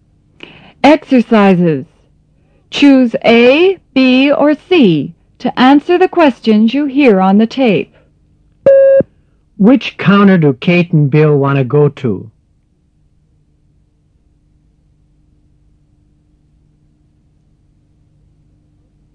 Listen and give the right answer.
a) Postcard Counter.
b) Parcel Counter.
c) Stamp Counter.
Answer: c) Stamp Counter.